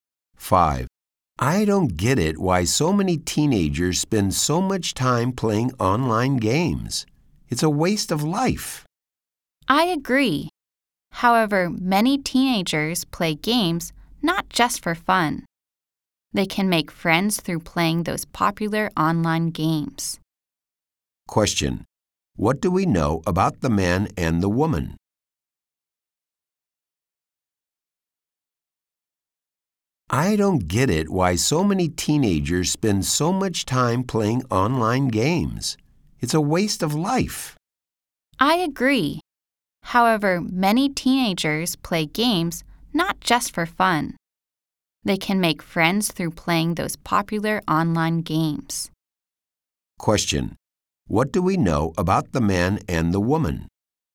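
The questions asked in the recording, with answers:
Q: What do we know about the man and the woman?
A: They both think playing online games wastes time, but one says teenagers can make friends through games.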